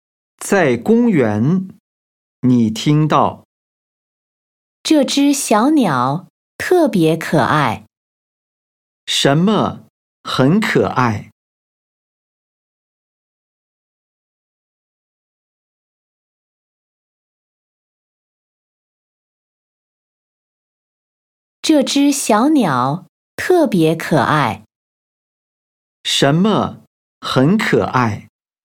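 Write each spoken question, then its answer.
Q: 什么很可爱?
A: 小鸟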